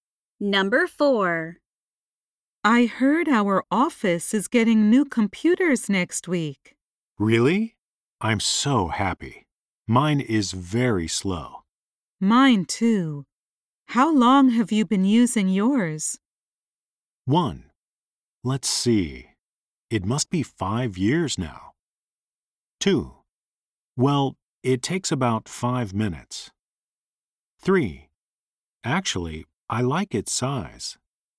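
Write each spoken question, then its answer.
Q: Mine too. How long have you been using yours?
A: 1: Let's see. It must be 5 years now.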